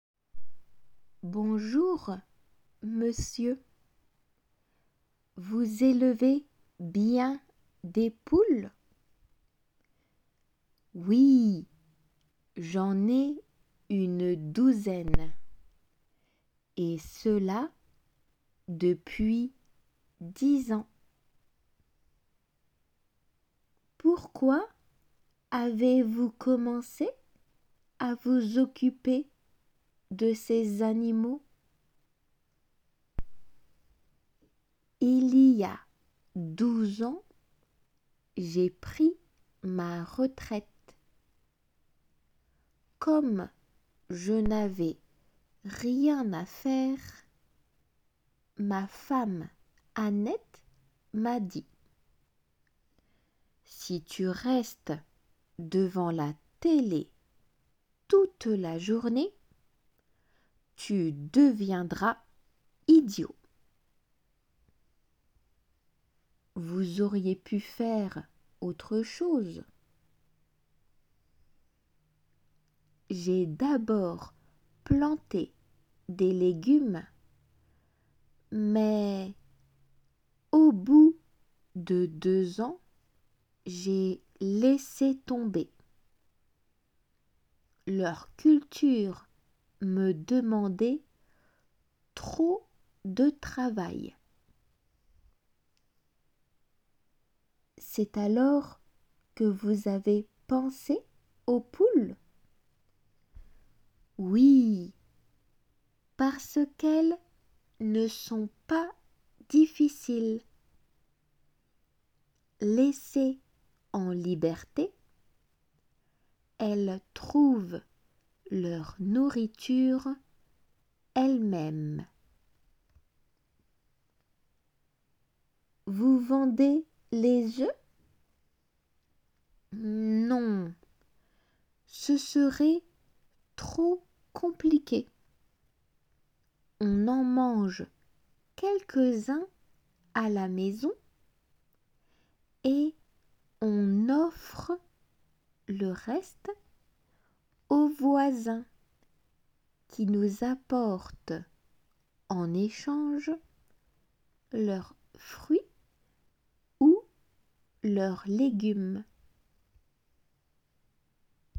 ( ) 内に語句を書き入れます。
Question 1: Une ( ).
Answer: douzaine

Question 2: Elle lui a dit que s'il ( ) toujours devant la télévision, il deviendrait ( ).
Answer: restait, idiot

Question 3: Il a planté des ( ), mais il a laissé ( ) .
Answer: légume tomber

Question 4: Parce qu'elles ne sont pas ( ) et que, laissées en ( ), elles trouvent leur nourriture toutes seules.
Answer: difficiles leberté

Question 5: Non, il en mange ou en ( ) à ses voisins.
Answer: offre

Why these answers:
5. 応答の中の en offre が 音声のみで聞き取りが少々聞き取りにくいのですが 文の中での表現が理解できれば on offre と分かるはずで offre のみ ( )に記入

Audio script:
La journaliste : Bonjour, monsieur. Vous élevez bien des poules ?
Michel : Oui, j'en ai une douzaine. Et cela, depuis dix ans.
La journaliste : Pourquoi avez-vous commencé à vous occuper de ces animaux ?
Michel : Il y a 12 ans, j'ai pris ma retraite. Comme je n'avais rien à faire, ma femme Annette m'a dit : "Si tu restes devant la télé toute la journée, tu deviendras idiot."
La journaliste : Vous auriez pu faire autre chose.
Michel : J'ai d'abord planté des légumes, mais au bout de deux ans, j'ai laissé tomber. Leur culture me demandait trop de travail.
La journaliste : C'est alors que vous avez pensé aux poules ?
Michel : Oui, parce qu'elles ne sont pas difficiles. Laissées en liberté, elles trouvent leur nourriture elles-mêmes.
La journaliste : Vous vendez les œufs ?
Michel : Non, ce serait trop compliqué. On en mange quelques-uns à la maison, et on offre le reste aux voisins qui nous apportent en échange leurs fruits ou leurs légumes.